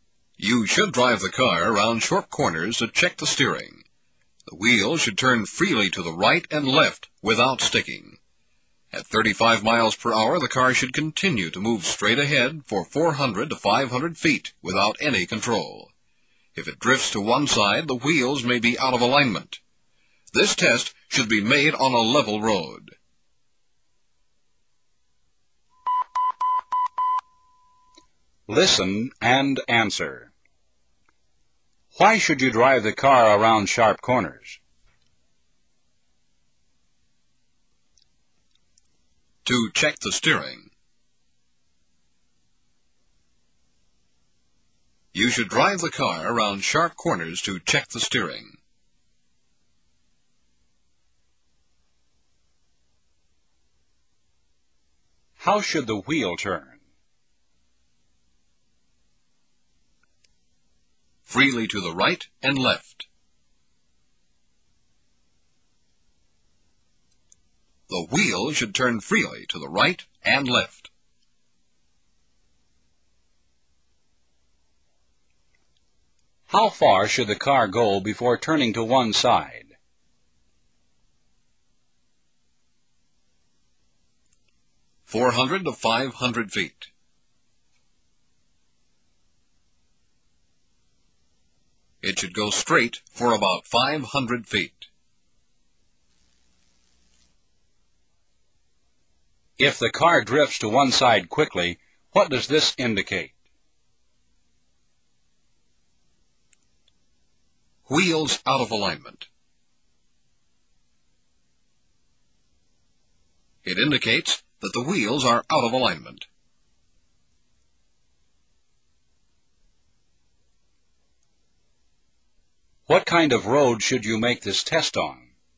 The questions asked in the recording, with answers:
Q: Why should you drive the car around sharp corners?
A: To check the steering. You should drive the car around sharp corners to check the steering.

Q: How should the wheel turn?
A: Freely to the right and left.

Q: How far should the car go before turning to one side?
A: Four hundred to 500 feet.

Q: If the car drifts to one side quickly, what does this indicate?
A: Wheels out of alignment. It indicates that the wheels are out of alignment.

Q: What kind of road should you make this test on?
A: On a flat, level road. This test should be made on a flat, level road.